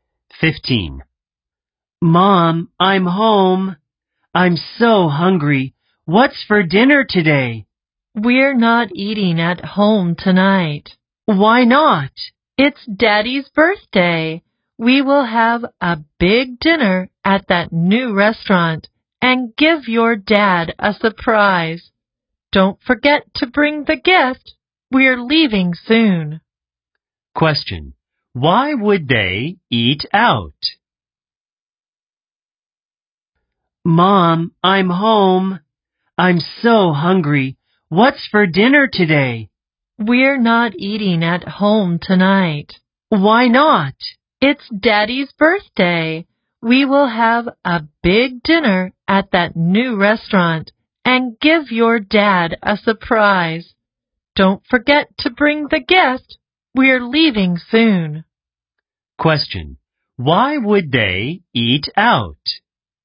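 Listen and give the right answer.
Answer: It's Dad's birthday.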